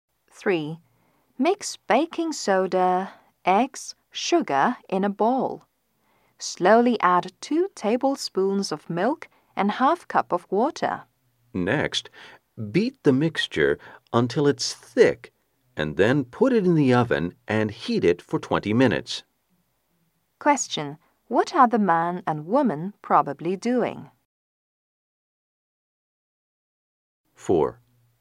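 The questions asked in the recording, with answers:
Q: What are the man and woman probably doing?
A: Baking a cake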